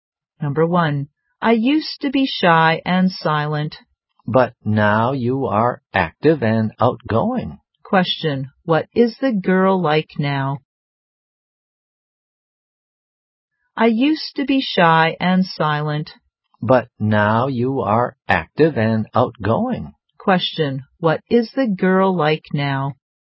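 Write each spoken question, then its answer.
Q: what is the girl like now?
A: Active and outgoing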